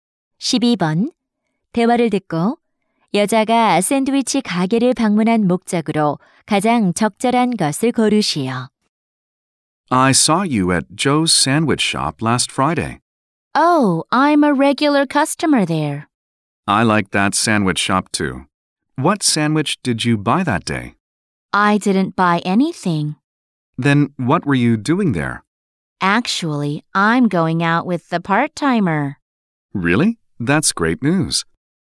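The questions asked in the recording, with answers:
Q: 대화를 듣고 여자가 샌드위치 가게를 방문한 목적으로 가장 적절한 것을 고르시오.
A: 사귀는 아르바이트생을 만나려고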